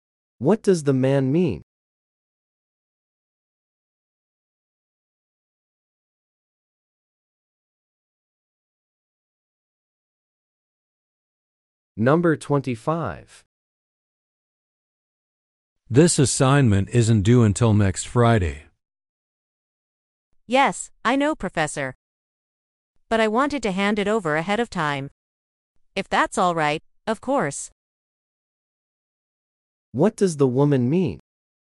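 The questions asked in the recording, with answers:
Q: What does the woman mean?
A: She wants to hand in the assignment early.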